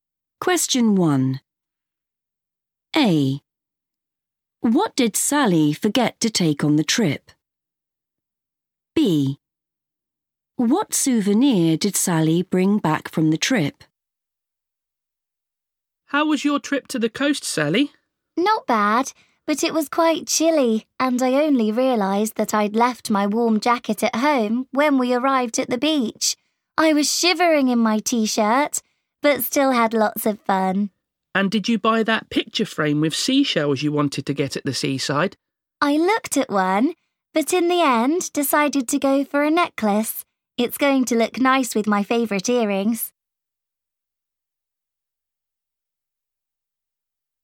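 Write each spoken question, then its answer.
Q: What did Sally forget to take on the trip?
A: warm jacket

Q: What souvenir did Sally bring back from the trip?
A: a necklace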